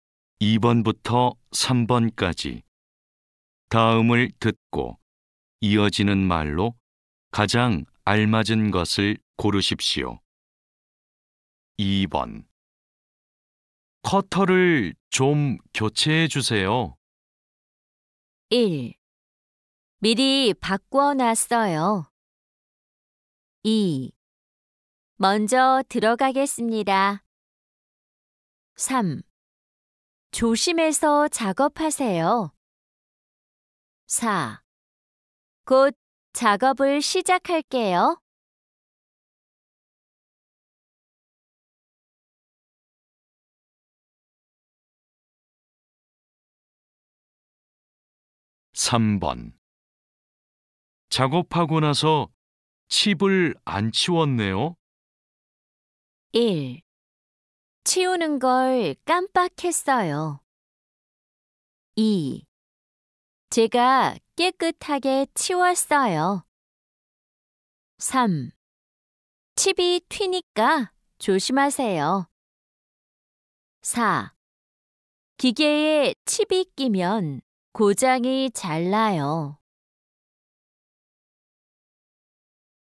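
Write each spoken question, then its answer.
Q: 작업하고 나서 칩을 안 치웠네요.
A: 1: 치우는 걸 깜빡했어요.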